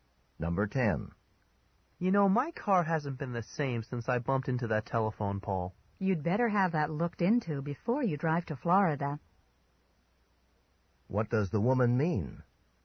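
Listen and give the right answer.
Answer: He should have his car checked before driving to Florida.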